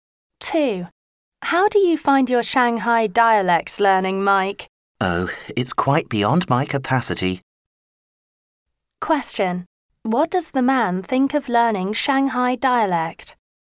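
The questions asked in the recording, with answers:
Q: What does the man think of learning Shanghai dialect?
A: It is too difficult for him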